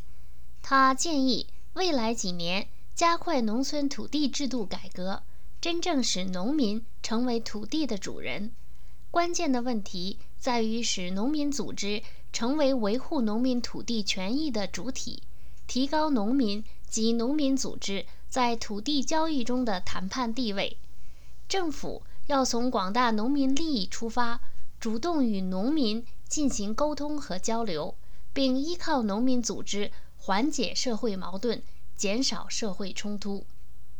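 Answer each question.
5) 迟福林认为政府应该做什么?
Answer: 从农民利益出发,主动与农民沟通和交流,依靠农民组织缓解社会矛盾,减少社会冲突

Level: 3rd Year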